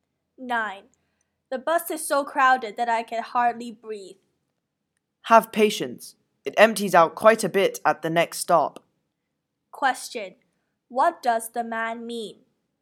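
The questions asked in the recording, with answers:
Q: What does the man mean?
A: The bus will be less crowded after the next stop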